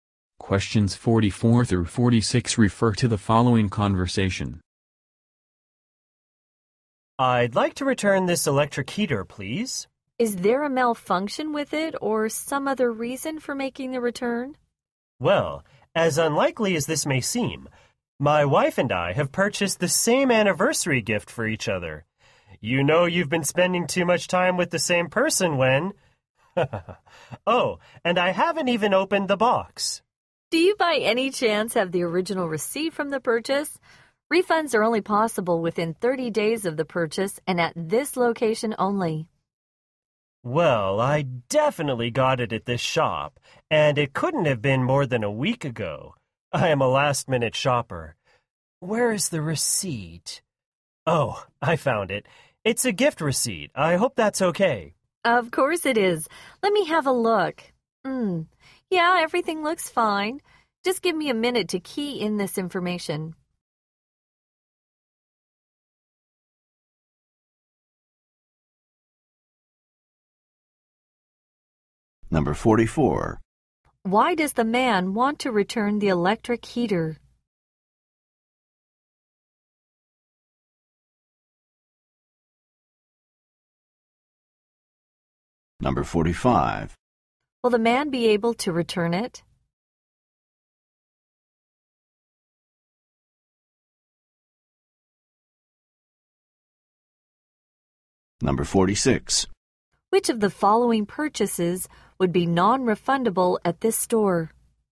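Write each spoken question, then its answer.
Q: Why does the man want to return the electric heater?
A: His wife bought him the same gift

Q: Will the man be able to return it?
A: Yes

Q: Which of the following purchases would be non-refundable at this store?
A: Items bought over 30 days ago or at another location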